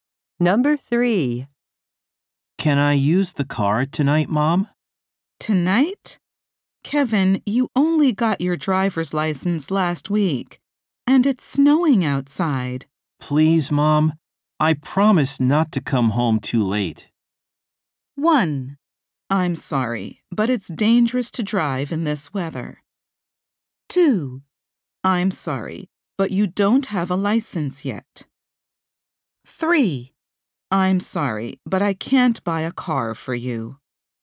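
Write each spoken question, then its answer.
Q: Please, Mom, I promise not to come home too late.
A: 1: I'm sorry, but it's dangerous to drive in this weather.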